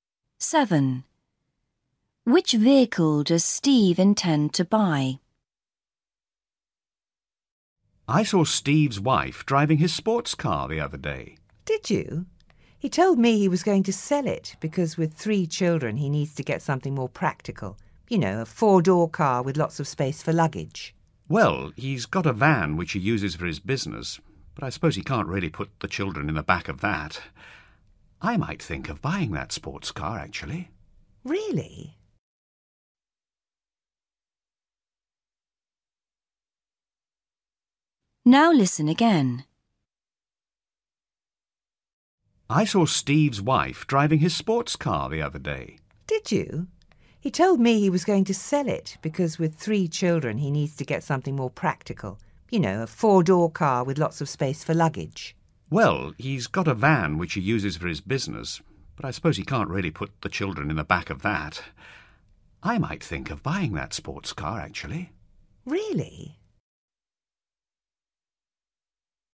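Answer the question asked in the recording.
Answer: a 4-door car with lots of space for luggage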